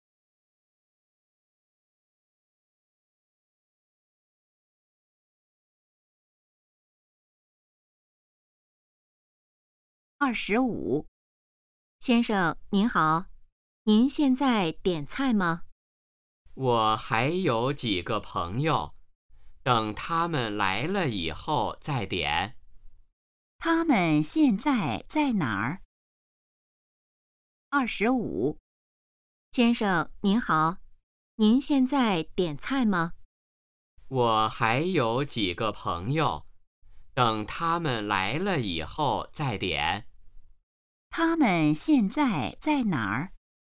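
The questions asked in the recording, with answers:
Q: 他们现在在哪儿?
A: 饭馆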